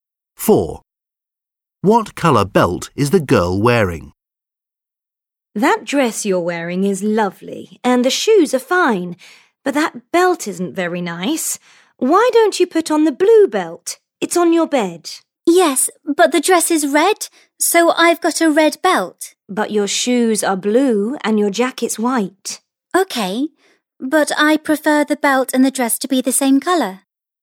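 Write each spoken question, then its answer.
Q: What colour belt is the girl wearing?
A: red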